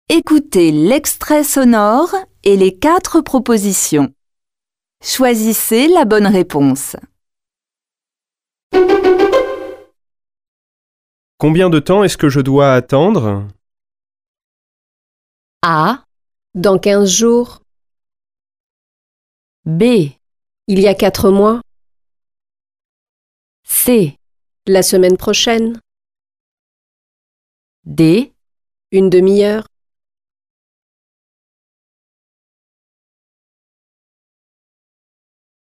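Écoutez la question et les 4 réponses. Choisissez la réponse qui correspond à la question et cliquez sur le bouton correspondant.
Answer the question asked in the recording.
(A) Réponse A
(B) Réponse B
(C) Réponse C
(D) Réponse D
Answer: (D) Réponse D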